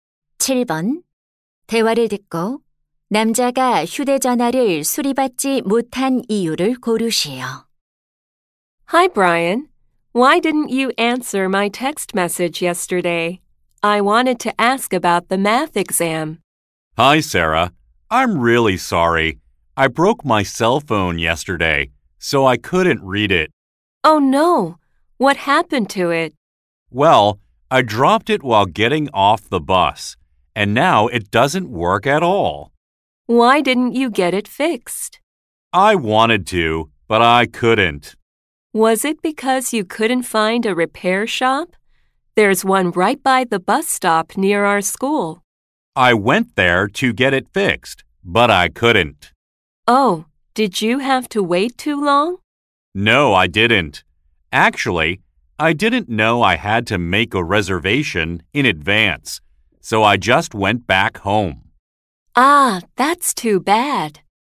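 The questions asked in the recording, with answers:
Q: 대화를 듣고 남자가 휴대전화를 수리받지 못한 이유를 고르세요.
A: 미리 예약하지 않아서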